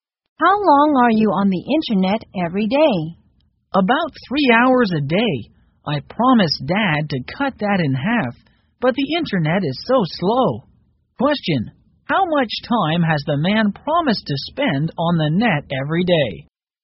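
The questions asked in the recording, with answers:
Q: how much time has the man promised to spend on the net every day?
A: 1.5 hours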